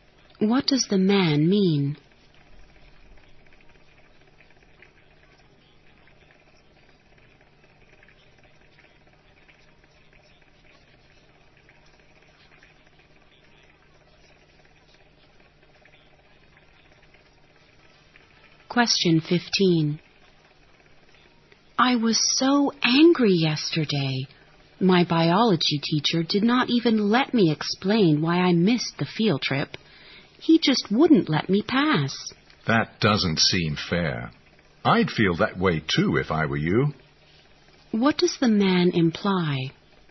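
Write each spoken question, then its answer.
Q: What does the man imply?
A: He understands why she is angry; the teacher was unfair.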